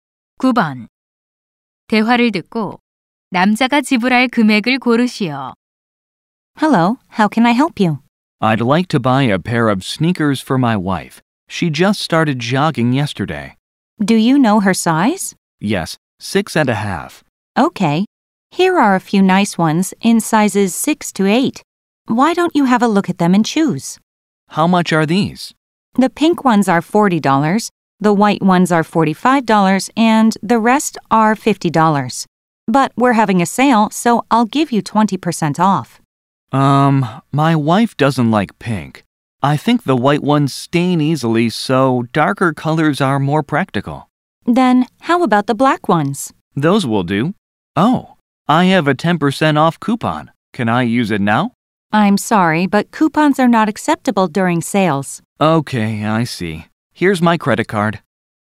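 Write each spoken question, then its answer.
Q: 대화를 듣고 남자가 지불할 금액을 고르시오.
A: $40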